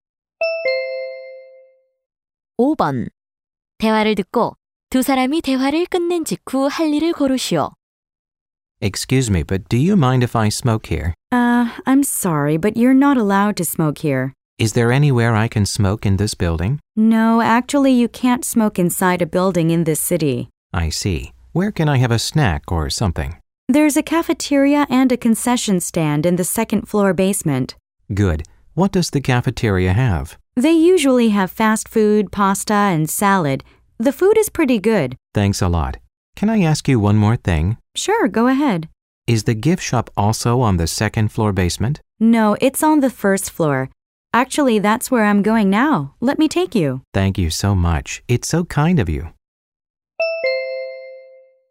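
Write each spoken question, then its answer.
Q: 대화를 듣고 두 사람이 대화를 끝낸 직후 할 일을 고르시오.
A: 1층 선물 가게에 함께 가기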